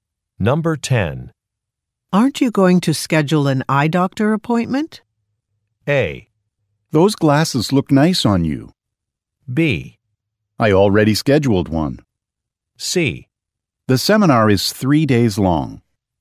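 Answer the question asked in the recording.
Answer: B: I already scheduled one.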